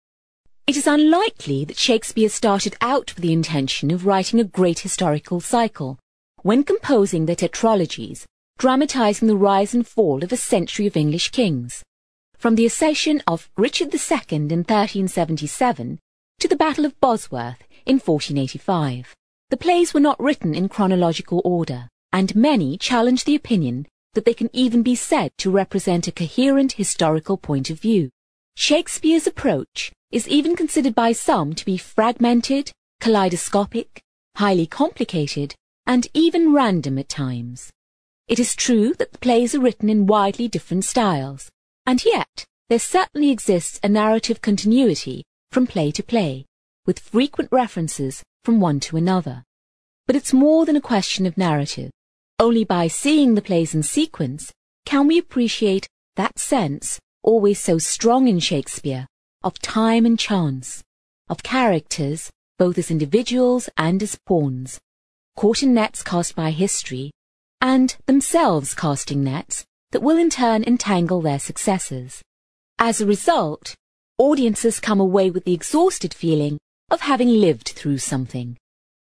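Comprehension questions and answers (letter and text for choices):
You are going to hear a part of a review about a staging of Shakespeare's history plays. For questions 7-8, choose the answer (A, B or C) which fits best according to what you hear.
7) According to the speaker, the plays...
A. were written in chronological order.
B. represent a coherent historical point of view.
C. were not written according to a plan.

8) Seeing the plays in sequence makes the audience...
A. realise the characters are at the mercy of fate.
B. feel more confused.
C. understand the self-sufficiency of the characters.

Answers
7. C. were not written according to a plan.
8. A. realise the characters are at the mercy of fate.

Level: CPE Proficiency English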